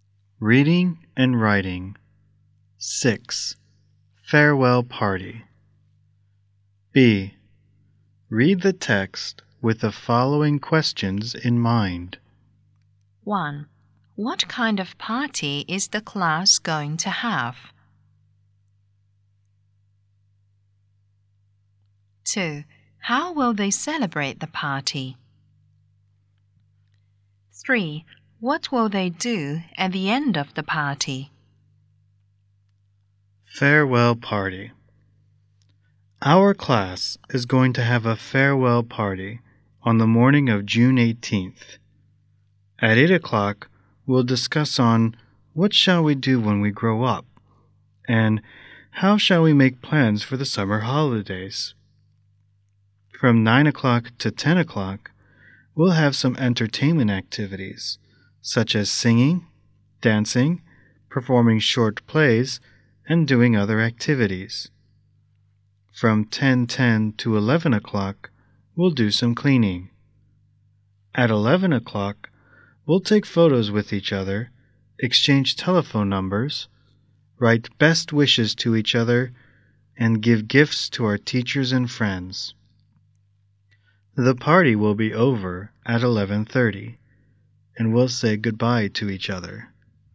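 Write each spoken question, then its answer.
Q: What kind of party is the class going to have?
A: A farewell party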